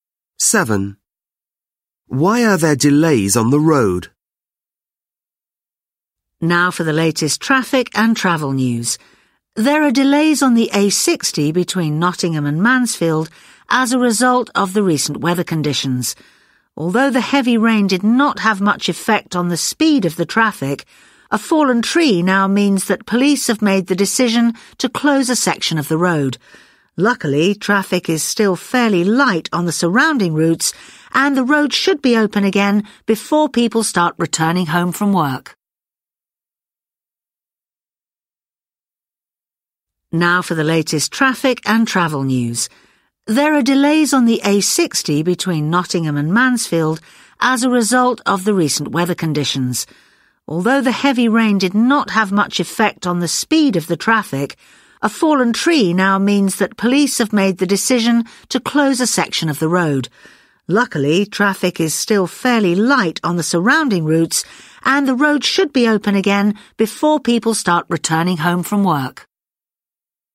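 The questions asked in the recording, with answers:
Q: Why are there delays on the road?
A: A fallen tree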